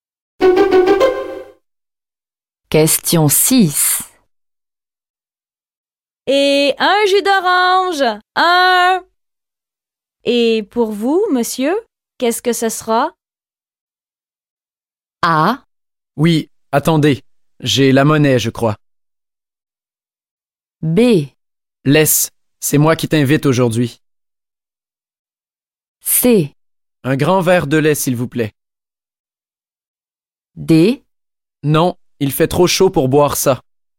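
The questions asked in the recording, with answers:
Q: Et pour vous, monsieur, qu'est-ce que ce sera?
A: C: Un grand verre de lait, s'il vous plaît.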